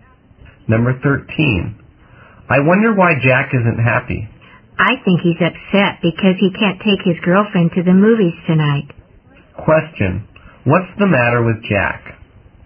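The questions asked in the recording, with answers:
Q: What's the matter with Jack?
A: He can't take his girlfriend to the movies tonight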